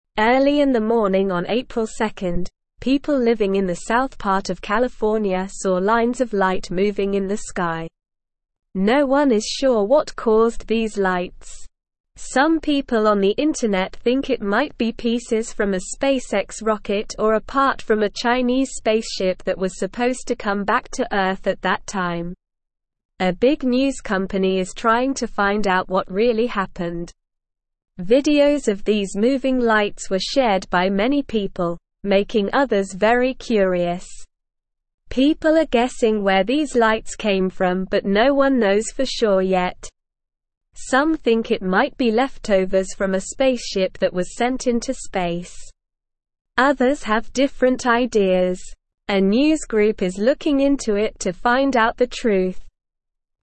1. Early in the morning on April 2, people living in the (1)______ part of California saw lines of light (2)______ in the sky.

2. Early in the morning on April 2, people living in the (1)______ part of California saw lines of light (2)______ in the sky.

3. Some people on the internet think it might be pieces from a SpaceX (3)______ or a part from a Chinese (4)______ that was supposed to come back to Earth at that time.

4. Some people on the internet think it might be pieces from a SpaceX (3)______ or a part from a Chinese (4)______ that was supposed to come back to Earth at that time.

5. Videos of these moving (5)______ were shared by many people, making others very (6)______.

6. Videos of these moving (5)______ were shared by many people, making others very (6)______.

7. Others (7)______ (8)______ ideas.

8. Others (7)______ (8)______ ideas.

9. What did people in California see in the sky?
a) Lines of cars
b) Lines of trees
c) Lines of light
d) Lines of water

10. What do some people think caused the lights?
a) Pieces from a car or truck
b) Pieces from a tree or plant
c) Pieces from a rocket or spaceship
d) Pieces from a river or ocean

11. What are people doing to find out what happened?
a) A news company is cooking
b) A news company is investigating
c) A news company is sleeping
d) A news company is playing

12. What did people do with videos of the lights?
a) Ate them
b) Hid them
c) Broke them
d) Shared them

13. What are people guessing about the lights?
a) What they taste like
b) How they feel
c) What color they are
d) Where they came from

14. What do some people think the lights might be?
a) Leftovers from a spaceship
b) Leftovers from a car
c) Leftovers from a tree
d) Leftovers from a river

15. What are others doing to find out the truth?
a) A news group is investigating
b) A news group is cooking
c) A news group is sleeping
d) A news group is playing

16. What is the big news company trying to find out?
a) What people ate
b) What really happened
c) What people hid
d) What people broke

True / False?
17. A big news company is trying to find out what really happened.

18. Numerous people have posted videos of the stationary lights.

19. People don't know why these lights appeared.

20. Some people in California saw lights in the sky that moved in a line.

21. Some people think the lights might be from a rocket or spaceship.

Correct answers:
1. south
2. moving
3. rocket
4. spaceship
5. lights
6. curious
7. have
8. different
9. c
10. c
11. b
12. d
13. d
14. a
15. a
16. b
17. True
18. False
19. True
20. True
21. True

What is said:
Early in the morning on April 2, people living in the south part of California saw lines of light moving in the sky. No one is sure what caused these lights. Some people on the internet think it might be pieces from a SpaceX rocket or a part from a Chinese spaceship that was supposed to come back to Earth at that time.
Videos of these moving lights were shared by many people, making others very curious. People are guessing where these lights came from but no one knows for sure yet. Some think it might be leftovers from a spaceship that was sent into space. Others have different ideas. A news group is looking into it to find out the truth.

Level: Level 1

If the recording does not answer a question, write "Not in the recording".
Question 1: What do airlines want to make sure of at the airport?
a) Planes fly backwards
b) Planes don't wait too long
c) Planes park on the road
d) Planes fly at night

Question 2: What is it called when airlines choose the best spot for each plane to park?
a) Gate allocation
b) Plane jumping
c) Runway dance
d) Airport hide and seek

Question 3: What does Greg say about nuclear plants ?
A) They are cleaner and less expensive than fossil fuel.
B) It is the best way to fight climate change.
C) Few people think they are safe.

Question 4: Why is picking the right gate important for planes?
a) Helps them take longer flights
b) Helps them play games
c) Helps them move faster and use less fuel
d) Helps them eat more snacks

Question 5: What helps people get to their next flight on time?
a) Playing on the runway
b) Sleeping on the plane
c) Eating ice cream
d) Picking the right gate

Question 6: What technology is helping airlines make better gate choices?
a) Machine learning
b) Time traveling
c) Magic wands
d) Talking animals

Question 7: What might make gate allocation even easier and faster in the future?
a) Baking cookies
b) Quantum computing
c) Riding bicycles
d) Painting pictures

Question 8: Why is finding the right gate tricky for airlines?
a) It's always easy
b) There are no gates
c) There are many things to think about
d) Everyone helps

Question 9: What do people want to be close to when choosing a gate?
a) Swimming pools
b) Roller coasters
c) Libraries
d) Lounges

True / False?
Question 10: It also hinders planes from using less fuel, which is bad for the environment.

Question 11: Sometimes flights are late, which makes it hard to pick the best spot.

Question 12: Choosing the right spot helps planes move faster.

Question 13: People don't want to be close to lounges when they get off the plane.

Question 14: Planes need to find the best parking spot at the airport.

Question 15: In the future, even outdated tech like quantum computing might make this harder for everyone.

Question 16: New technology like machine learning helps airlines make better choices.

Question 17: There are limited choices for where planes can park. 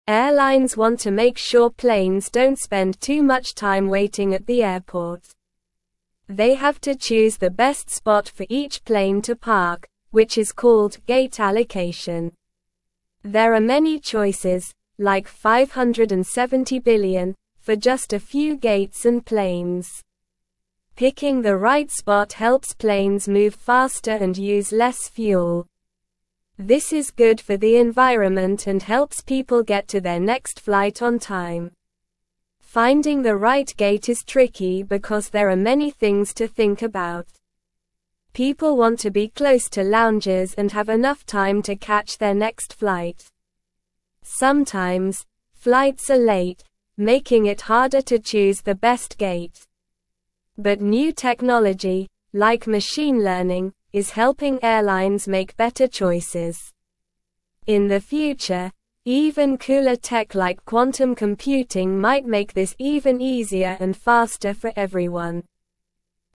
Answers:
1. b
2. a
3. Not in the recording
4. c
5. d
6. a
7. b
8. c
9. d
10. False
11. True
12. True
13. False
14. True
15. False
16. True
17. False

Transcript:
Airlines want to make sure planes don't spend too much time waiting at the airport. They have to choose the best spot for each plane to park, which is called gate allocation. There are many choices, like 570 billion, for just a few gates and planes! Picking the right spot helps planes move faster and use less fuel. This is good for the environment and helps people get to their next flight on time.
Finding the right gate is tricky because there are many things to think about. People want to be close to lounges and have enough time to catch their next flight. Sometimes, flights are late, making it harder to choose the best gate. But new technology, like machine learning, is helping airlines make better choices. In the future, even cooler tech like quantum computing might make this even easier and faster for everyone.

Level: Level 1

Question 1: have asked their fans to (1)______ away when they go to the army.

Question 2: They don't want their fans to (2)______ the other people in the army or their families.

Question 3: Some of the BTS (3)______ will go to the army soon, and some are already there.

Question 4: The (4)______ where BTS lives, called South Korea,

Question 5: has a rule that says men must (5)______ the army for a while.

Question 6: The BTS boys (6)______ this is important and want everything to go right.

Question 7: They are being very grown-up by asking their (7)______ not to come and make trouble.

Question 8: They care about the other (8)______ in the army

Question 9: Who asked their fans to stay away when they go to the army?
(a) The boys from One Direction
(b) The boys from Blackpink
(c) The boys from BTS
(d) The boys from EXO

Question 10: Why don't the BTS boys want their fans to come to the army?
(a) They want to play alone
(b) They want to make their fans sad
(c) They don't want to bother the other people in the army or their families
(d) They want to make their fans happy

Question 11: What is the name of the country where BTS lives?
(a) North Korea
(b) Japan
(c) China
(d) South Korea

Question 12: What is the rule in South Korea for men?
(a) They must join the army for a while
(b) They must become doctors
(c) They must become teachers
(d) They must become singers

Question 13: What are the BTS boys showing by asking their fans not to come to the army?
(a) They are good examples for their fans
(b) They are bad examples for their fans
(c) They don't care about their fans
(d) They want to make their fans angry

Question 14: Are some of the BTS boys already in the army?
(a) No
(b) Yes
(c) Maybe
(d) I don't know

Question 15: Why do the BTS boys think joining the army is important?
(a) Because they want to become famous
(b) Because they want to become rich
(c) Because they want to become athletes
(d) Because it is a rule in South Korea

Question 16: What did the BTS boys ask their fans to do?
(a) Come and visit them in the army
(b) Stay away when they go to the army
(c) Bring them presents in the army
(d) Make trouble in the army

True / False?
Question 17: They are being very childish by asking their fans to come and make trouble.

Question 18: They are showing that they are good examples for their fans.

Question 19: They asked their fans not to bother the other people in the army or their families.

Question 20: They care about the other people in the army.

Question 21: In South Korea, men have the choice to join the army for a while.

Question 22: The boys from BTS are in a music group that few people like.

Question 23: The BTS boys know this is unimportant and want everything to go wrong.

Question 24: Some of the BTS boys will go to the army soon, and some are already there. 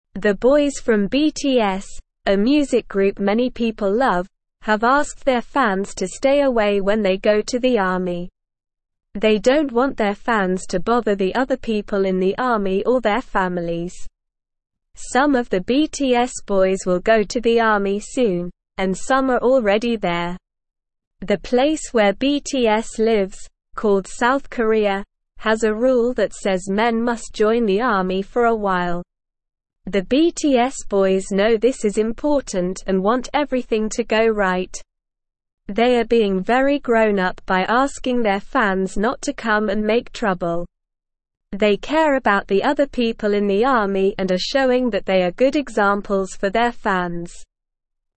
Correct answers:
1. stay
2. bother
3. boys
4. place
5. join
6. know
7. fans
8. people
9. c
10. c
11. d
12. a
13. a
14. b
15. d
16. b
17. False
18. True
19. True
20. True
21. False
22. False
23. False
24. True

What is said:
The boys from BTS, a music group many people love, have asked their fans to stay away when they go to the army. They don't want their fans to bother the other people in the army or their families.
The place where BTS lives, called South Korea, has a rule that says men must join the army for a while. The BTS boys know this is important and want everything to go right. They are being very grown-up by asking their fans not to come and make trouble. They care about the other people in the army and are showing that they are good examples for their fans.

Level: Level 1

